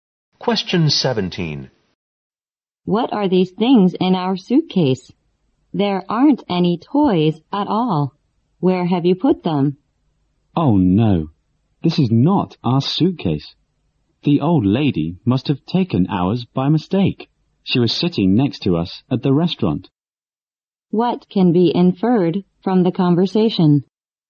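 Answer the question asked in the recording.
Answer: The old lady took their suitcase by mistake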